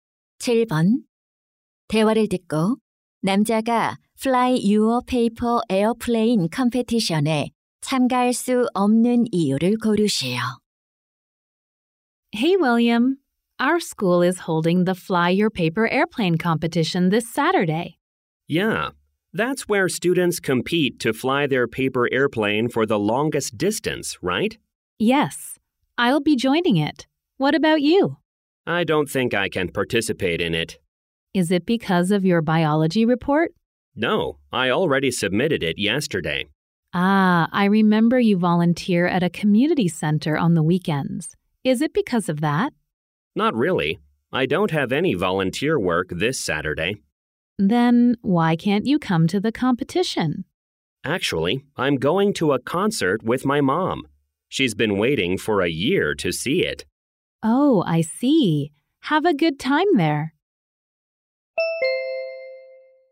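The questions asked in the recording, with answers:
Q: 대화를 듣고 남자가 Fly Your Paper Airplane Competition에 참가할 수 없는 이유를 고르시오.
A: 엄마와 콘서트에 가야 해서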